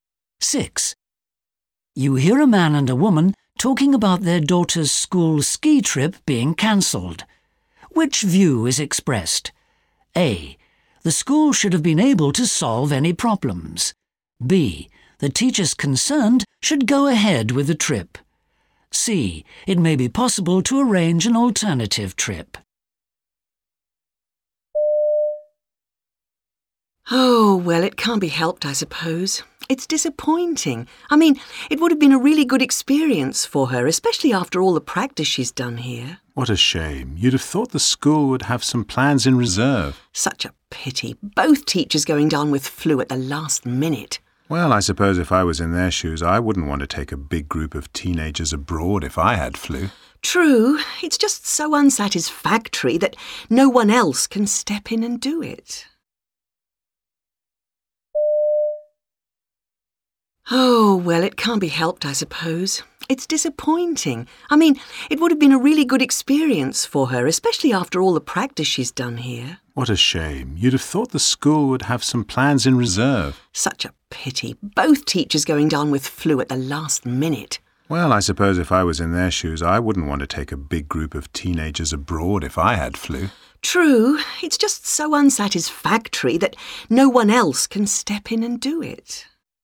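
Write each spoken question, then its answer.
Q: Which view is expressed?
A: A: The school should have been able to solve any problems.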